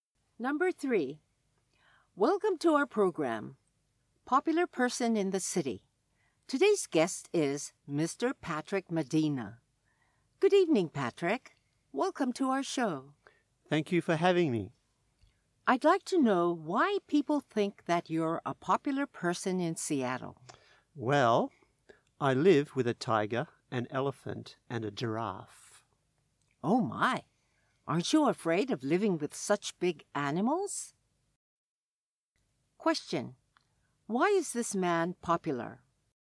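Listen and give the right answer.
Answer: He lives with a tiger, an elephant, and a giraffe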